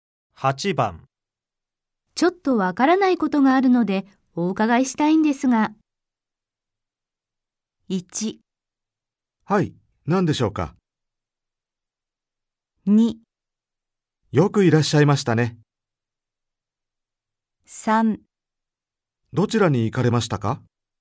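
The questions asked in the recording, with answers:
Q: ちょっとわからないことがあるのでお伺いしたいんですが。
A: 1: はい、何でしょうか。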